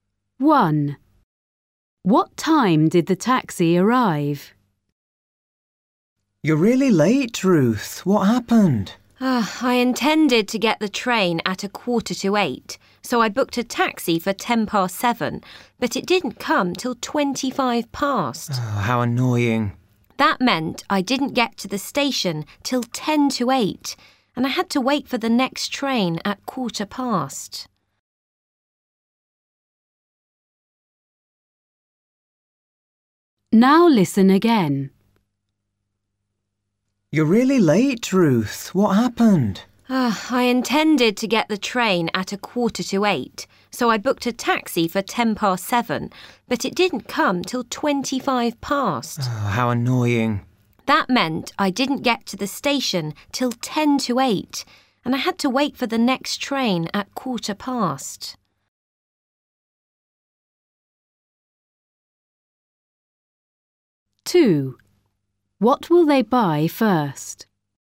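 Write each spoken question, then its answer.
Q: What time did the taxi arrive?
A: 7:25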